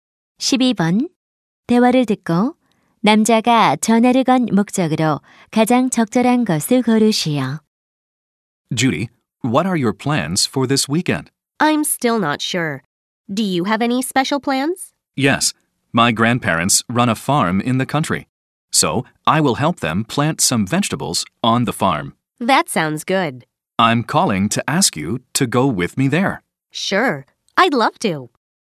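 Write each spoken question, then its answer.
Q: 대화를 듣고 남자가 전화를 건 목적으로 가장 적절한 것을 고르시오.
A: 농장에 함께 가자고 요청하려고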